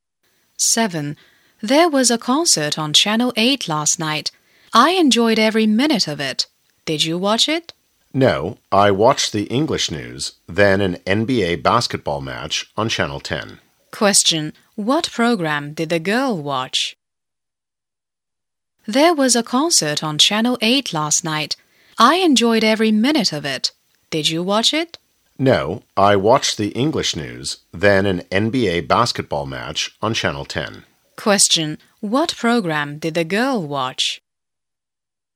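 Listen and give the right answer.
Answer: The English news and an NBA basketball match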